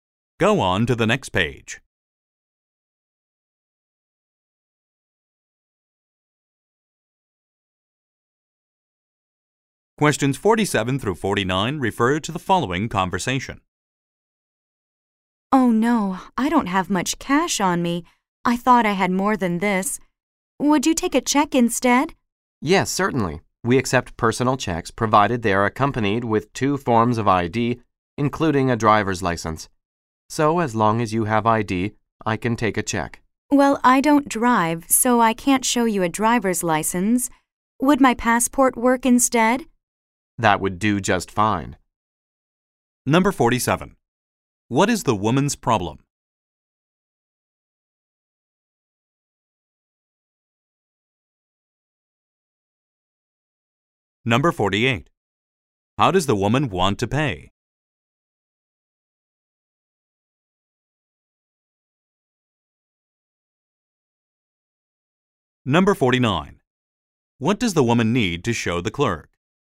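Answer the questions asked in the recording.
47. She doesn't have enough cash
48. By check
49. Two forms of ID (her passport)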